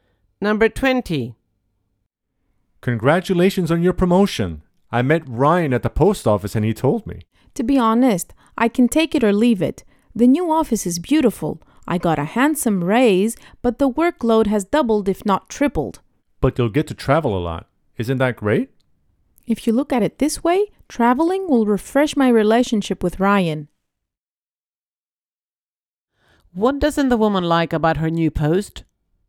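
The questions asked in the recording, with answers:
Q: What doesn't the woman like about her new post?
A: The workload has doubled or tripled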